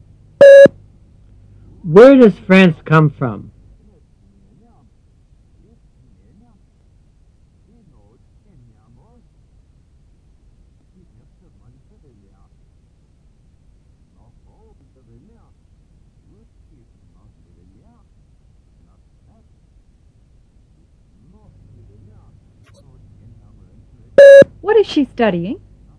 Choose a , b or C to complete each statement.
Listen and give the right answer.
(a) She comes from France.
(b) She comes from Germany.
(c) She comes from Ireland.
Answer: (a) She comes from France.